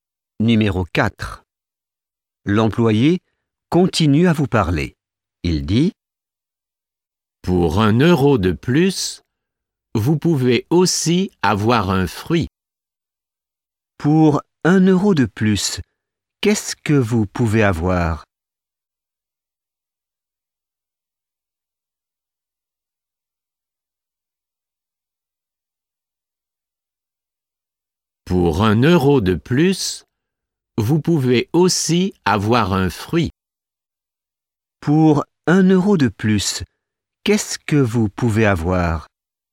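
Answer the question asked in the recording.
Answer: Un fruit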